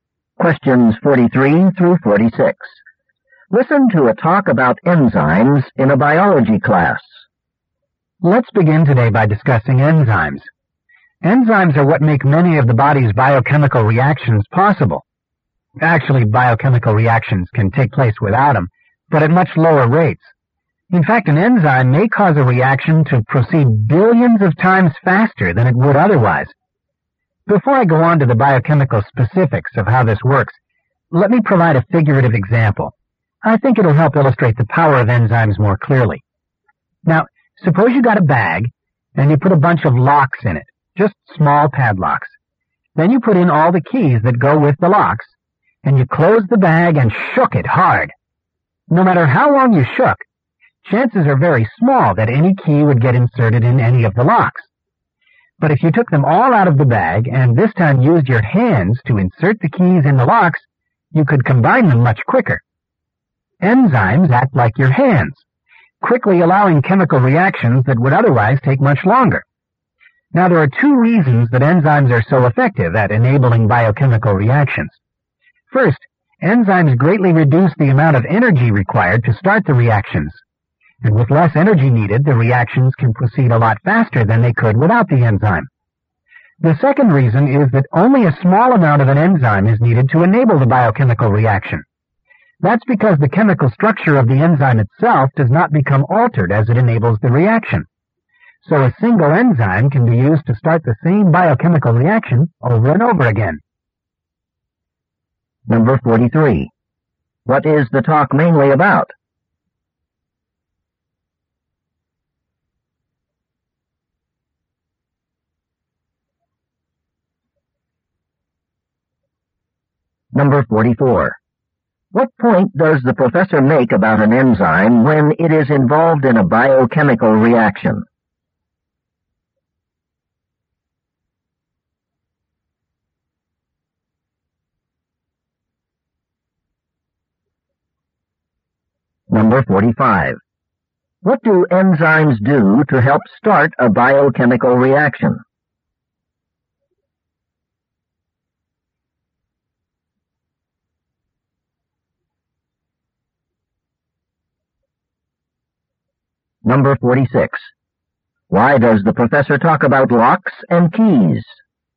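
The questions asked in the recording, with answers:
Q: What is the talk mainly about?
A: How enzymes make biochemical reactions possible

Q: What point does the professor make about an enzyme when it is involved in a biochemical reaction?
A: Its structure isn't changed, so it can be reused

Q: What do enzymes do to help start a biochemical reaction?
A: They reduce the energy needed

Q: Why does the professor talk about locks and keys?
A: To illustrate how enzymes speed up reactions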